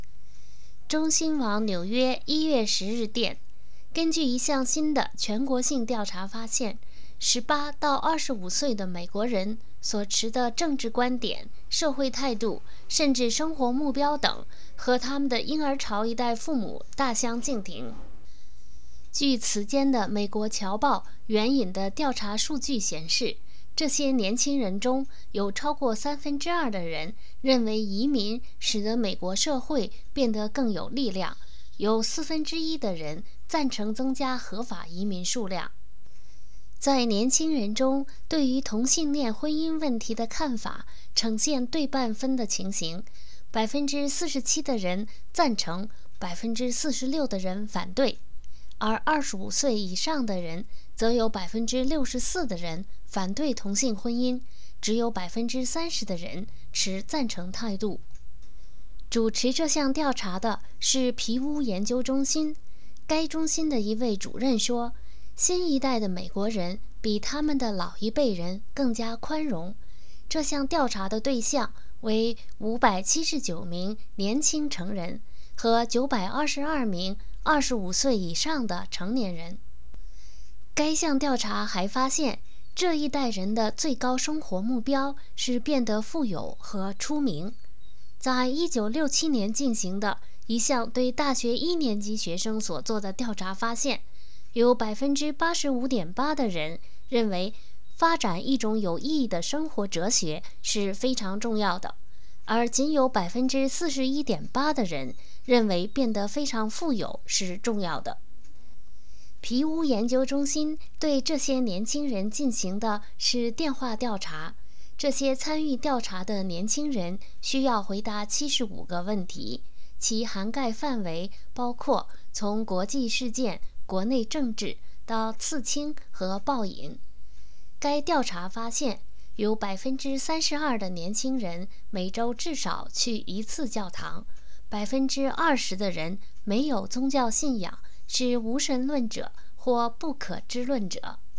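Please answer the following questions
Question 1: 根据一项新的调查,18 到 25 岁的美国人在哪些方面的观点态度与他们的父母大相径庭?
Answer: 政治观点、社会态度,甚至生活目标

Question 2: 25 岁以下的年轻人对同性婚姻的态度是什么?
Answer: 对半分:47%赞成,46%反对

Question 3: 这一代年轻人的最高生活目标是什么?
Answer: 变得富有和出名

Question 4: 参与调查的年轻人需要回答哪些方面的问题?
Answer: 75个问题,从国际事件、国内政治到刺青和暴饮

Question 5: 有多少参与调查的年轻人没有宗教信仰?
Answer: 20%

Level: 3rd Year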